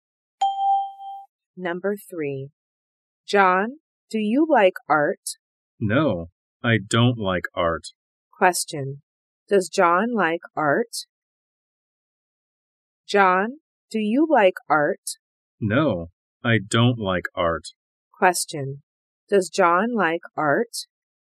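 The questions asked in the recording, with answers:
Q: Does John like art?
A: No, he doesn't.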